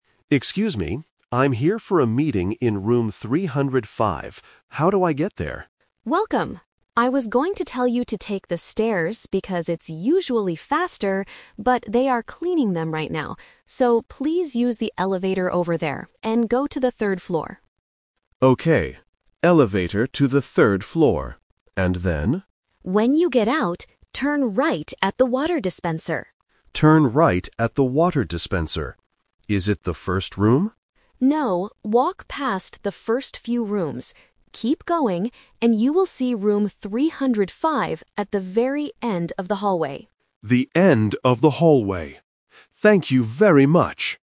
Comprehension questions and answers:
Listen to the conversation between a visitor and a receptionist. Choose the correct answer (A, B, or C) for each question.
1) How should the visitor go to the third floor?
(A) By using the stairs.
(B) By taking the elevator.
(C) By walking outside.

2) Where should the visitor turn right?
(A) At the elevator.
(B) At the first room.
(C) At the water dispenser.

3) Where is Room 305 located?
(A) At the very end of the hallway.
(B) Next to the stairs.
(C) In the first room.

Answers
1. (B) By taking the elevator.
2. (C) At the water dispenser.
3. (A) At the very end of the hallway.

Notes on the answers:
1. The Key: The receptionist clearly says, "please use the elevator over there and go to the third floor." The Trap: Option (A) is a classic "Twist" trap. The receptionist was going to suggest the stairs, but changed the plan because they are being cleaned.
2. The Key: The receptionist gives a specific landmark: "turn right at the water dispenser." The Trap: Option (B) is what the visitor guesses ("Is it the first room?"), but the receptionist corrects him. Option (A) is where he starts his walk on the third floor, but not where he turns.
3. The Key: The receptionist explicitly states, "you will see Room 305 at the very end of the hallway." The Trap: Option (C) is the trap because the visitor asks about the "first room," but is told to walk past it. Option (B) mentions the stairs, which were part of the rejected route downstairs.

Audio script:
Visitor: Excuse me, I'm here for a meeting in Room 305. How do I get there?
Receptionist: Welcome! I was going to tell you to take the stairs because it's usually faster, but they are cleaning them right now. So, please use the elevator over there and go to the third floor.
Visitor: Okay, elevator to the third floor. And then?
Receptionist: When you get out, turn right at the water dispenser.
Visitor: Turn right at the water dispenser. Is it the first room?
Receptionist: No, walk past the first few rooms. Keep going, and you will see Room 305 at the very end of the hallway.

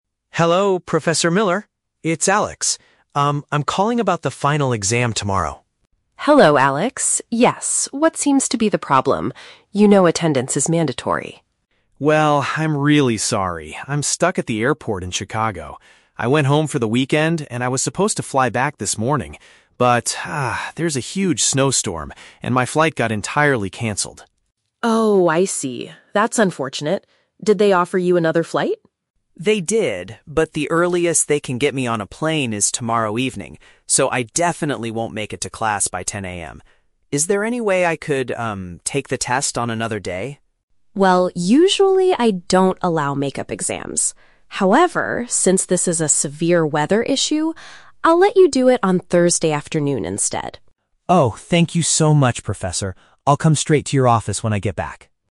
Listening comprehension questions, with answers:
Listen to the telephone conversation between a student and his professor. Choose the correct answer (A, B, or C) for each question.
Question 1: Why is the student calling the professor?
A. To complain about his bad travel experience.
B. To ask for a change in his test schedule.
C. To inform her that he will be late for the 10 AM class.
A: B. To ask for a change in his test schedule.

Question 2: What is the main reason for the student's problem?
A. He woke up late and missed his morning flight.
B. The airport is closed for the whole weekend.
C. Severe winter weather delayed his return.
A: C. Severe winter weather delayed his return.

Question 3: What did the professor decide to do?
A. Give him the exam on a different day.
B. Allow him to skip the final exam entirely.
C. Let him take the test tomorrow evening.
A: A. Give him the exam on a different day.

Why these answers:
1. The student asks, "Is there any way I could take the test on another day?". This matches option (B). Why the trap is wrong: Option (C) is the trap. The student mentions "10 AM", but he says "I definitely won't make it to class". This means he will be absent, not just late.
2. The student says there is a "huge snowstorm", which is paraphrased as "severe winter weather" in option (C). Why the trap is wrong: Option (A) is the trap. The audio mentions "fly back this morning", but he didn't miss the flight; the flight was cancelled. Option (B) is plausible but not mentioned in the audio.
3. The professor agrees and says, "I'll let you do it on Thursday afternoon instead". This means changing the exam to a different day. Why the trap is wrong: Option (C) is a very strong trap. The phrase "tomorrow evening" is mentioned in the audio, but it is the time of his new flight, not the time of his exam.

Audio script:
Student: Hello, Professor Miller? It's Alex. Um, I'm calling about the final exam tomorrow.
Professor: Hello, Alex. Yes, what seems to be the problem? You know attendance is mandatory.
Student: Well, I'm really sorry. I'm stuck at the airport in Chicago. I went home for the weekend, and I was supposed to fly back this morning. But, ah, there's a huge snowstorm, and my flight got entirely cancelled.
Professor: Oh, I see. That's unfortunate. Did they offer you another flight?
Student: They did, but the earliest they can get me on a plane is tomorrow evening. So, I definitely won't make it to class by 10 AM. Is there any way I could, um, take the test on another day?
Professor: Well, usually I don't allow make-up exams. However, since this is a severe weather issue... I'll let you do it on Thursday afternoon instead.
Student: Oh, thank you so much, Professor! I'll come straight to your office when I get back.

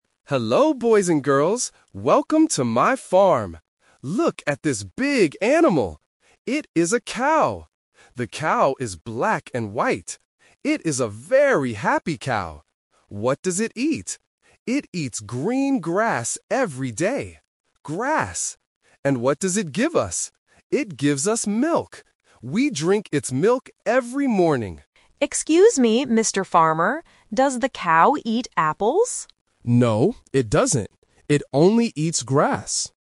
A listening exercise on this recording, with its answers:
Listen to a farmer talking to students on a farm trip. Choose the correct answer (A, B, or C).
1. What color is the cow?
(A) Brown and white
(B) Black and white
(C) Green and white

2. What does the cow eat?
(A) Apples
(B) Milk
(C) Grass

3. What does the cow give us?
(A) Milk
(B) Apples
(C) Water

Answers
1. (B) Black and white
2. (C) Grass
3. (A) Milk

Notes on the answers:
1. The farmer says clearly, "The cow is black and white." Option A (Brown and white) is a plausible color for a cow but is not mentioned. Option C uses "Green", which is the trap because it is the color of the grass.
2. The farmer says, "It eats green grass every day". Option A (Apples) is the trap because the student asks, "Does the cow eat apples?" but the farmer answers, "No." Option B (Milk) is what the cow gives, not what it eats.
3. The farmer asks, "And what does it give us?" and answers, "It gives us milk." Option B (Apples) is a trap from the student's question. Option C (Water) is not mentioned in the audio.

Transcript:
Farmer: Hello, boys and girls! Welcome to my farm. Look at this big animal. It is a cow. The cow is black and white. It is a very happy cow. What does it eat? It eats green grass every day. And what does it give us? It gives us milk. We drink its milk every morning.
Student: Excuse me, Mr. Farmer. Does the cow eat apples?

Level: A1

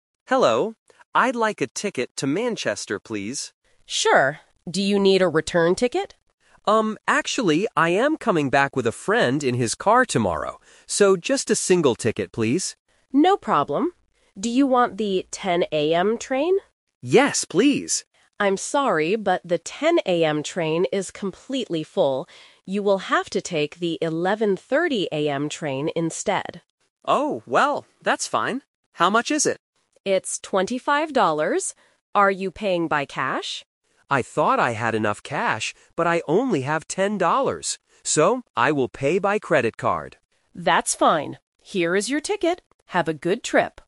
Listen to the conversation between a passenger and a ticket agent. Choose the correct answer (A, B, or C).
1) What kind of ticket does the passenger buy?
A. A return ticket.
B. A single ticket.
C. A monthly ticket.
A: B. A single ticket.

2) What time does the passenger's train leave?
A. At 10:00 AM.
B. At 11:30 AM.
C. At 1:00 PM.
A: B. At 11:30 AM.

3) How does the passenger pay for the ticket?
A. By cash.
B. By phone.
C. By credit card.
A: C. By credit card.

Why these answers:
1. The agent asks if he needs a "return ticket" (Option A - The Trap). The passenger says no because he is getting a ride back with a friend, so he asks for "just a single ticket, please." Option (C) is not mentioned.
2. This is a classic Twist. The passenger wanted the "10:00 AM train" (Option A - The Trap), but the agent says it is completely full. The agent gives him a ticket for the "11:30 AM train instead." Option (C) is a plausible train time but is never mentioned.
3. The agent asks if he is paying by "cash" (Option A - The Trap). The passenger says he only has 10 dollars, so he decides: "I will pay by credit card." Option (B) is not mentioned in the audio.

